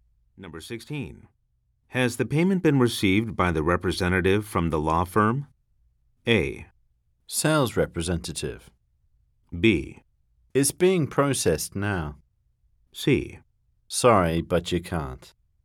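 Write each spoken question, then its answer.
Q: Has the payment been received by the representative from the law firm?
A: B: It's being processed now.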